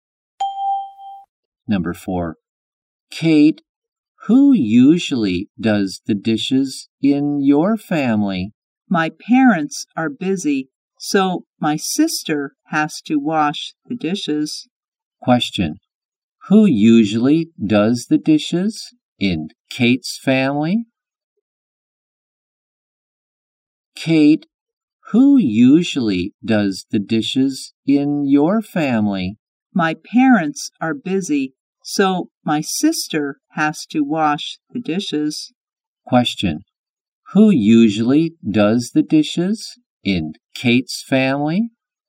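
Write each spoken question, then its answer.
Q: Who usually does the dishes in Kate's family?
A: Her sister.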